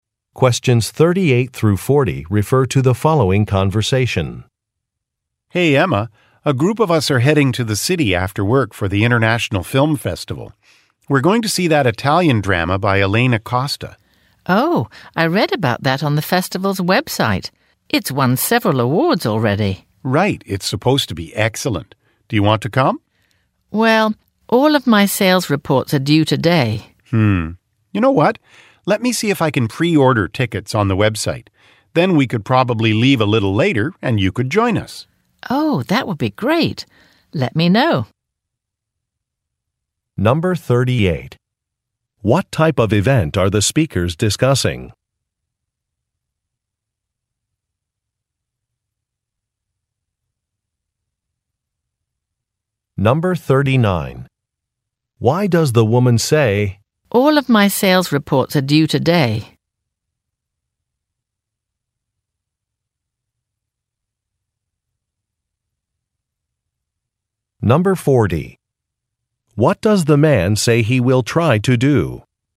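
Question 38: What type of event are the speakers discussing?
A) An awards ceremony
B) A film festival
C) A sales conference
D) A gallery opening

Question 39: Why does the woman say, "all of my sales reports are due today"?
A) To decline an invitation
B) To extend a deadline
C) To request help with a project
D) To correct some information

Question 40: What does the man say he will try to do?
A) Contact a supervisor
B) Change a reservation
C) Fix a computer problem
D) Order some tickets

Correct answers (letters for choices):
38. B
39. A
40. D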